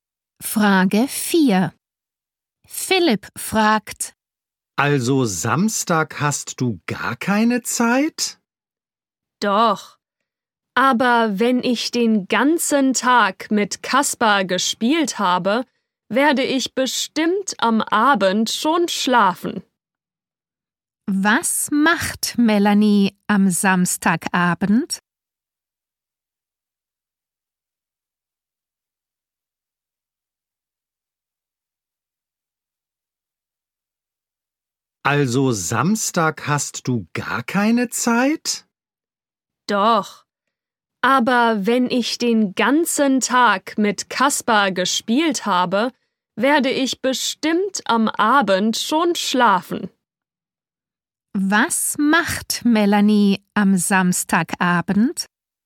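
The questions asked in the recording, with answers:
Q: Was macht Melanie am Samstagabend?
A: Sie schläft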